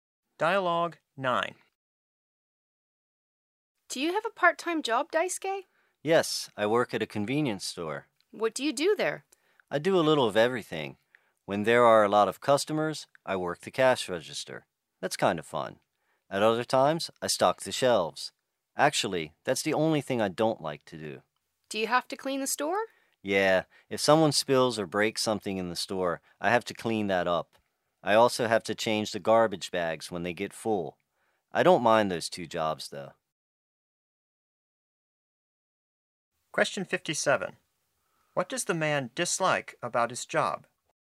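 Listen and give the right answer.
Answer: Stocking the shelves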